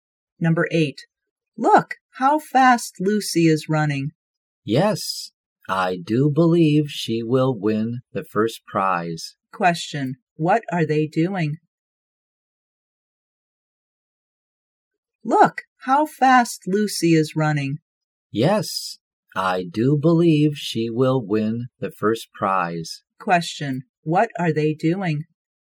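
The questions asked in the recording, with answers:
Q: What are they doing?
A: Watching a running race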